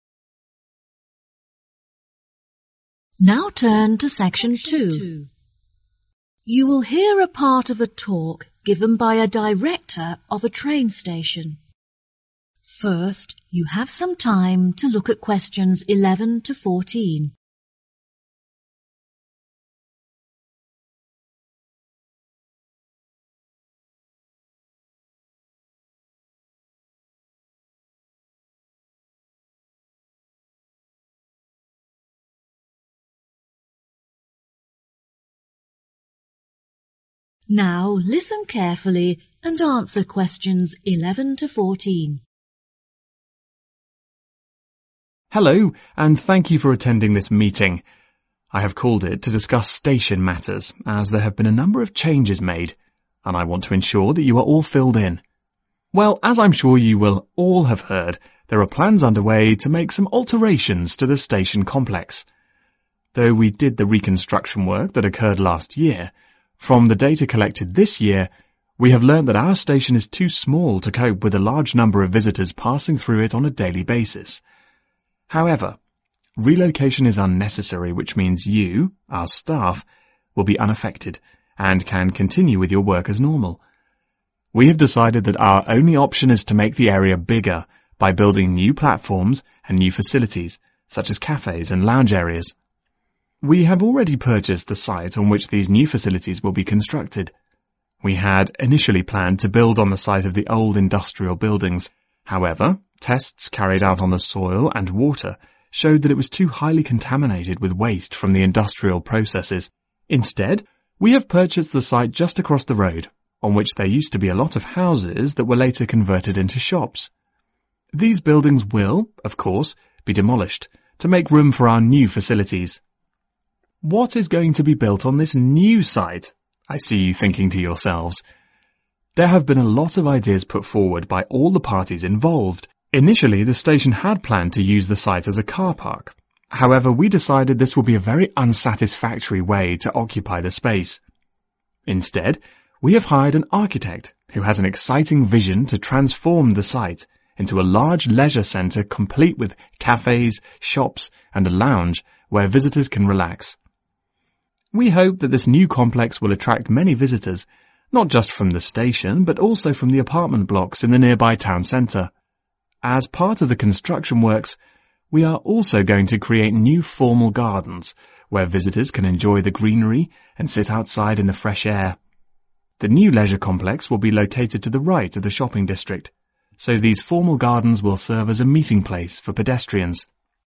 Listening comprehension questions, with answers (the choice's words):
Choose the correct answer.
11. What kind of changes is the station making?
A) relocation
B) reconstruction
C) expansion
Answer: expansion

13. Firstly the station intended to use the site as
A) a leisure centre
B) a car park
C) a lounge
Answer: a car park

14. The new buildings will be situated to the right side of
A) the shopping district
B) the apartment blocks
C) the new formal gardens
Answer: the shopping district